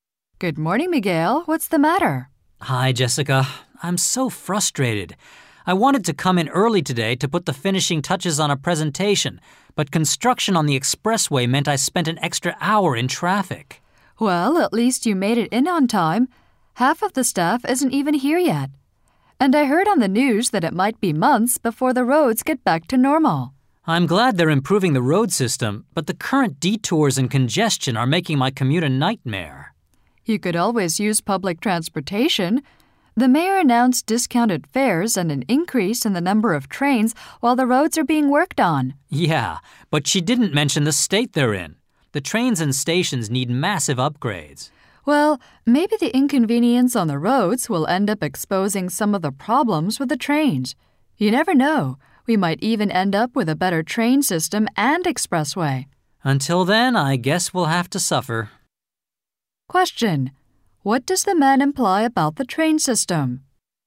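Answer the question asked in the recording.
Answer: It is in poor condition and needs major upgrades.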